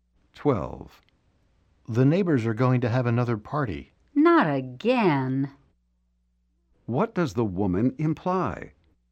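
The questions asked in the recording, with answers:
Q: What does the woman imply?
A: The neighbors have parties too often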